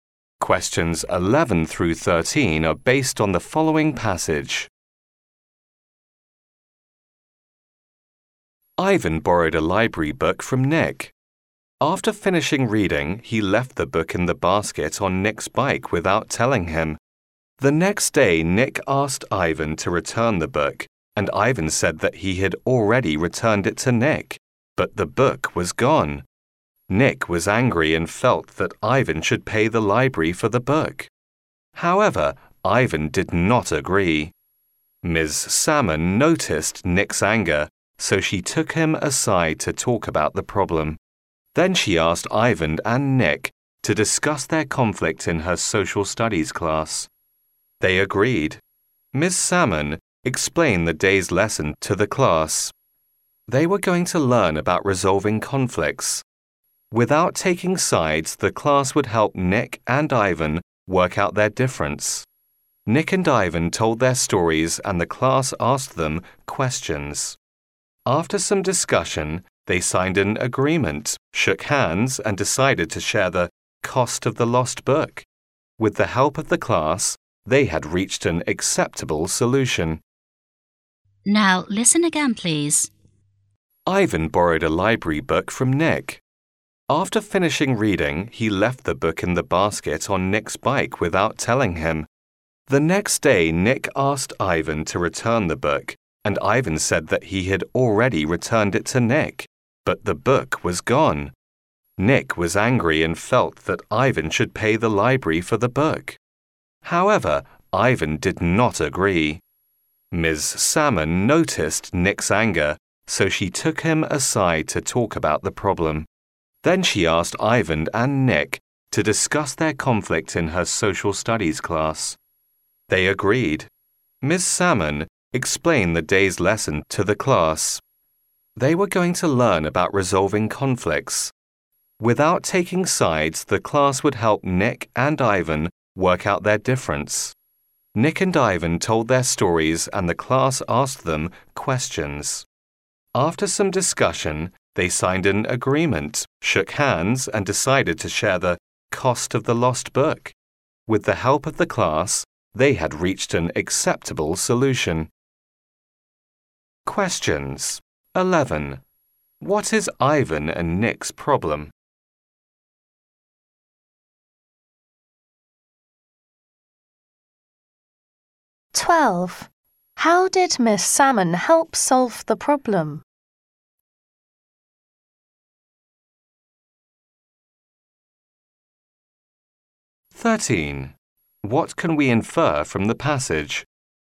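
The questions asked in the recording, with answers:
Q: What is Ivan and Nick's problem?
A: A lost library book and who should pay for it

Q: How did Miss Salmon help solve the problem?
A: She had them discuss the conflict in her class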